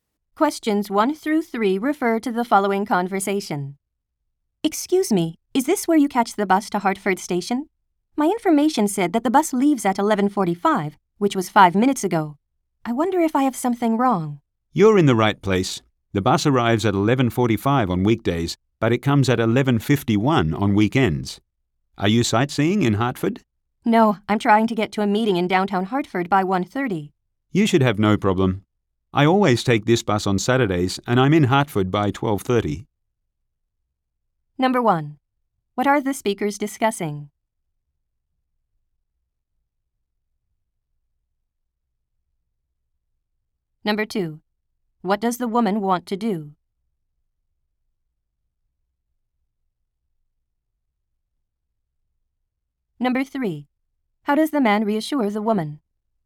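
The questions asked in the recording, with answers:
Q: What are the speakers discussing?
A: A bus schedule

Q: What does the woman want to do?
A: Get to a meeting in downtown Hartford by 1:30

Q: How does the man reassure the woman?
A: He says he takes this bus on Saturdays and arrives in Hartford by 12:30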